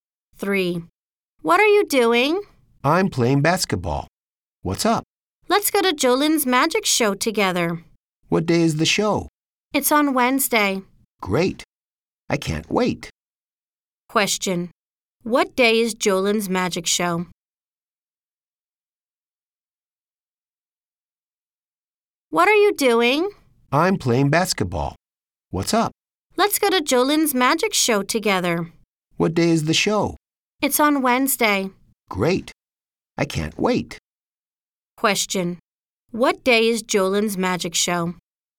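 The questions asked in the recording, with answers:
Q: What day is Jolin's magic show?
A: Wednesday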